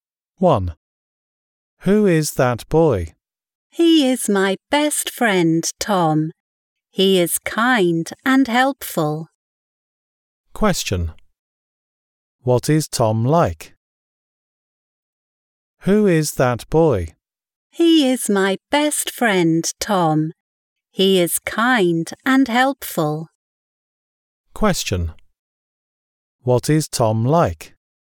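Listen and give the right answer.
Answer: He is kind and helpful.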